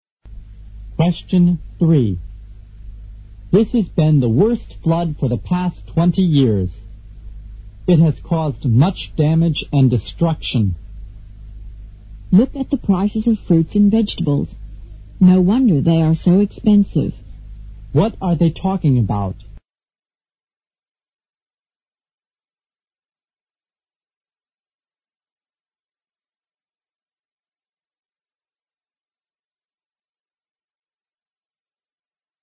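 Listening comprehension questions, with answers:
Q: What are they talking about?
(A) The effects of the flood.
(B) The heroic fight against a flood.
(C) The cause of the flood.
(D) Floods of the past twenty years.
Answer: (A) The effects of the flood.

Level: 六级

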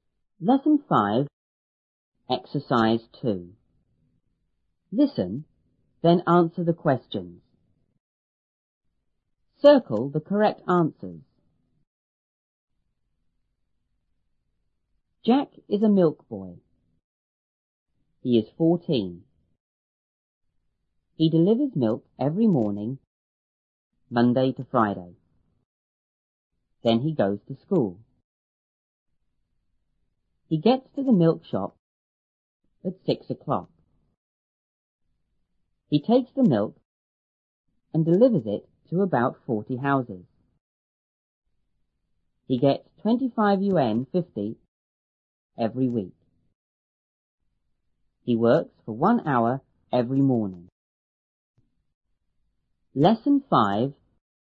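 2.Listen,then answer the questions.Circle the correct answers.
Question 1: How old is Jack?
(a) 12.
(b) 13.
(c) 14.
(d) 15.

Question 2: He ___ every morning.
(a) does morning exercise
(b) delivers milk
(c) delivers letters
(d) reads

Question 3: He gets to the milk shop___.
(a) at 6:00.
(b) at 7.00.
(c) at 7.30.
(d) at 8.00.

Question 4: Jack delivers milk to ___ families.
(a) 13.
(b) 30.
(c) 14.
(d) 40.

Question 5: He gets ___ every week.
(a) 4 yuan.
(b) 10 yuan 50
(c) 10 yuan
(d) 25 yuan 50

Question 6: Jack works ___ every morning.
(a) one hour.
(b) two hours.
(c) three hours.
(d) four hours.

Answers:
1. (c) 14.
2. (b) delivers milk
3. (a) at 6:00.
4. (d) 40.
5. (d) 25 yuan 50
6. (a) one hour.

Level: 初中英语广州版1B

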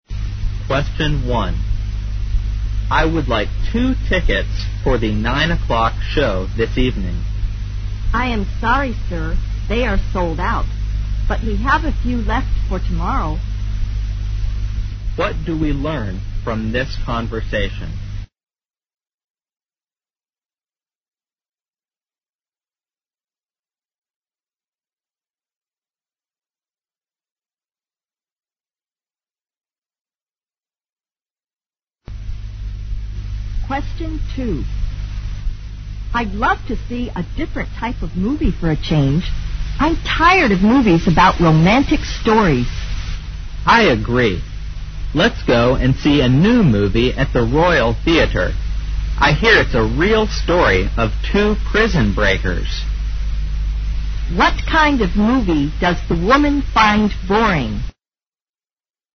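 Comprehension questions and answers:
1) What do we learn from this conversation?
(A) The man wants to attend tomorrow's show.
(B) There aren't any tickets left for tonight's show.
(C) There aren't any tickets left for tomorrow's show.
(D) The man doesn't want to attend tomorrow's show.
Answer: (B) There aren't any tickets left for tonight's show.

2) What kind of movie does the woman find boring?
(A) Detective stories.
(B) Stories about jail escapes.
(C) Love stories.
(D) Stories about royal families.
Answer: (C) Love stories.

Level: 大学英语四级

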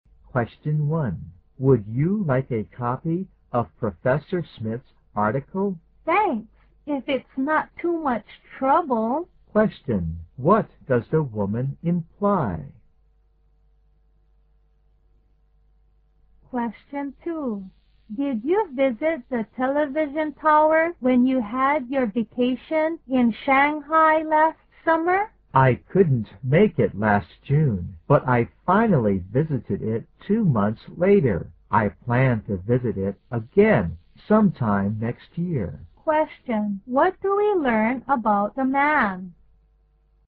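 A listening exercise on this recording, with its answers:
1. What does the woman imply?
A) She is not interested in the article.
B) She has given the man much trouble.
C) She would like to have a copy of the article.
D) She doesn't want to take the trouble to read the article.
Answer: C) She would like to have a copy of the article.

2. What do we learn about the man?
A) He saw the big tower he visited on TV.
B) He has visited the TV tower twice.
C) He has visited the TV tower once.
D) He will visit the TV tower in June.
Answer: C) He has visited the TV tower once.

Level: 大学英语四级

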